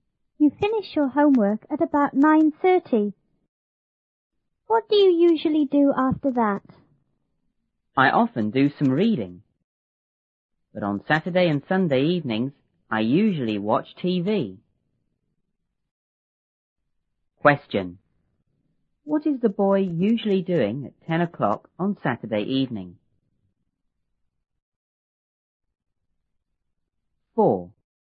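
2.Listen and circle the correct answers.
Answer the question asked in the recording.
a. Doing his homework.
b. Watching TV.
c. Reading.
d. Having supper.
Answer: b. Watching TV.

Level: 初中英语广州版1B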